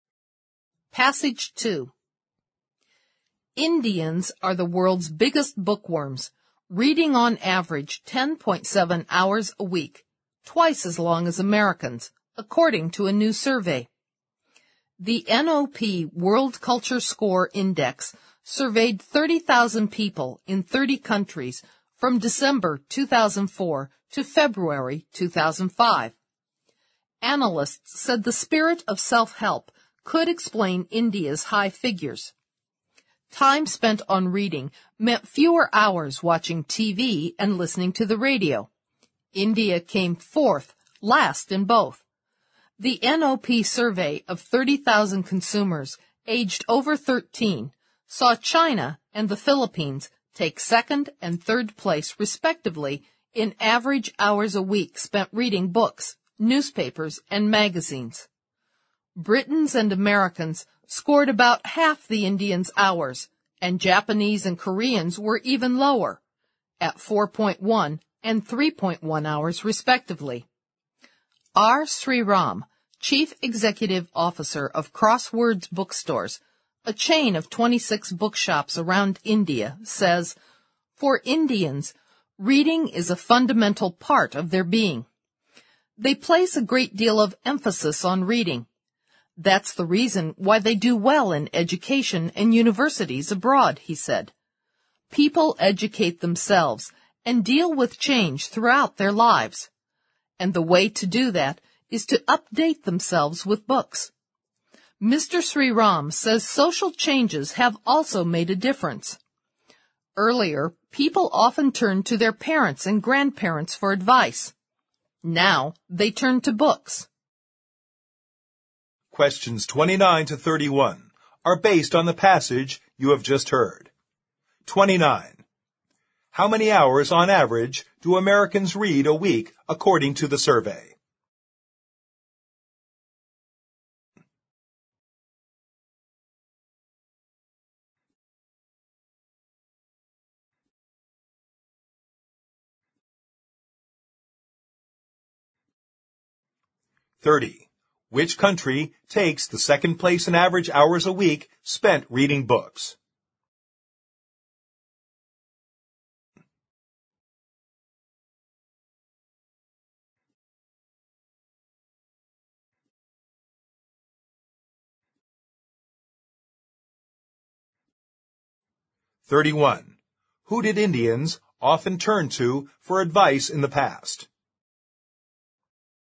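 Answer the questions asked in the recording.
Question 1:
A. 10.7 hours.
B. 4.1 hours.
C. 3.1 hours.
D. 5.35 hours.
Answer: D. 5.35 hours.
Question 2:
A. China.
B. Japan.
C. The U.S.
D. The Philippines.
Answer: A. China.
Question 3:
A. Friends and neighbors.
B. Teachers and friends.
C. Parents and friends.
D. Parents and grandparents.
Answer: D. Parents and grandparents.

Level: 四级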